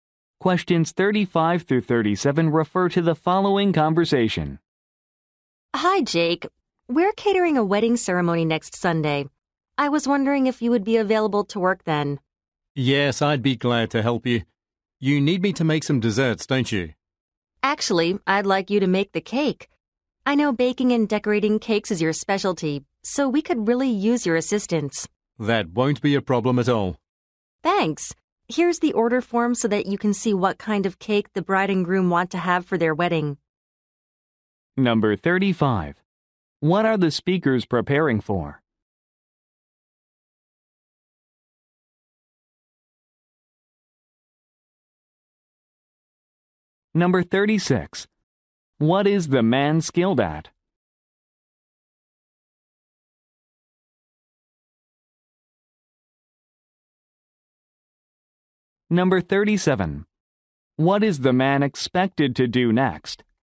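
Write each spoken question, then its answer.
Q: What are the speakers preparing for?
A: Catering a wedding ceremony

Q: What is the man skilled at?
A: Baking and decorating cakes

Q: What is the man expected to do next?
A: Look at the order form for the cake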